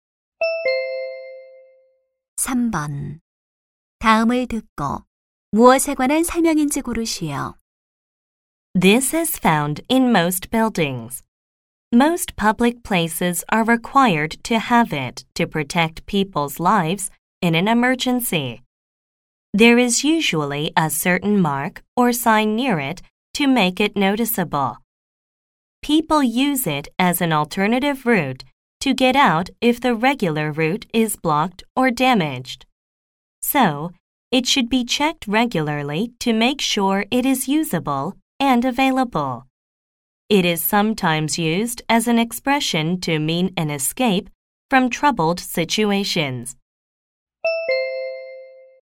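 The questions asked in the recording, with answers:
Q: 다음을 듣고 무엇에 관한 설명인지 고르시오.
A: 비상구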